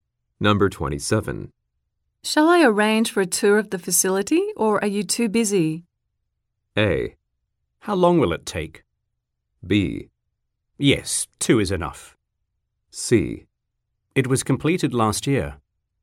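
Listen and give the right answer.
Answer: A: How long will it take?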